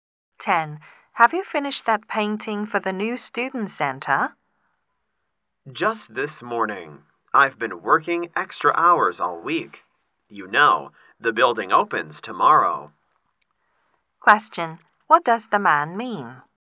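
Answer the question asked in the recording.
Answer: He finished the painting just in time.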